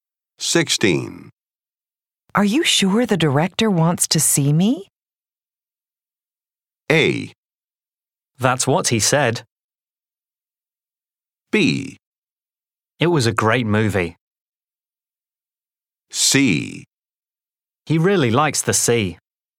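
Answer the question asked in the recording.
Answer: A: That's what he said.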